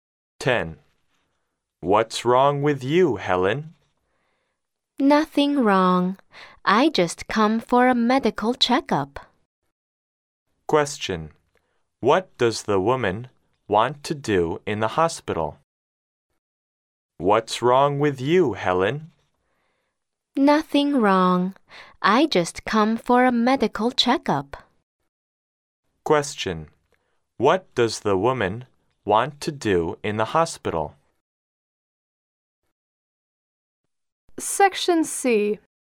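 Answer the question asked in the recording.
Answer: Have a medical checkup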